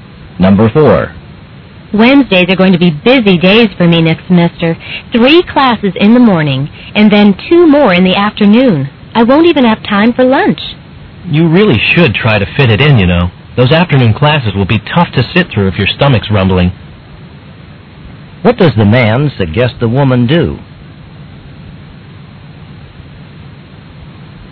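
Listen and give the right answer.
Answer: Make time to eat lunch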